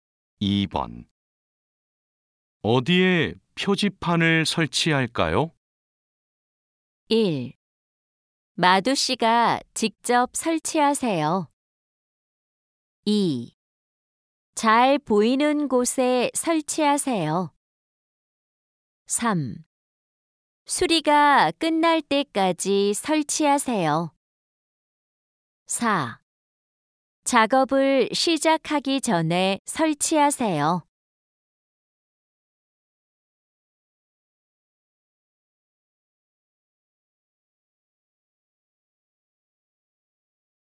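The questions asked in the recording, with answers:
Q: 어디에 표지판을 설치할까요?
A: 2: 잘 보이는 곳에 설치하세요.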